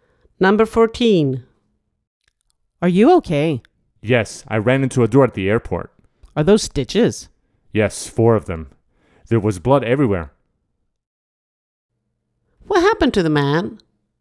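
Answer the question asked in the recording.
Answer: He ran into a door and got stitches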